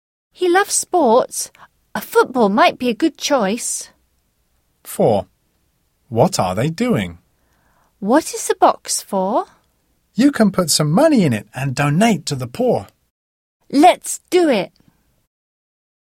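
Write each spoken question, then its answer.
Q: What are they doing?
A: Donating money to the poor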